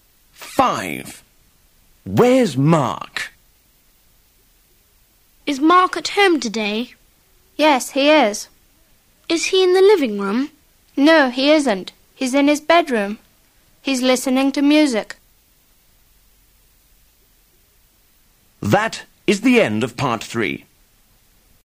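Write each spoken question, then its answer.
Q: Where's Mark?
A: In his bedroom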